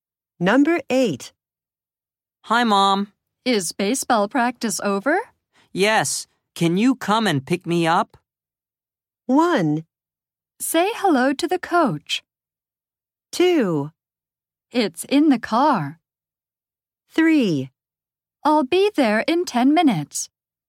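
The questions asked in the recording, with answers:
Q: Yes. Can you come and pick me up?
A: 3: I'll be there in 10 minutes.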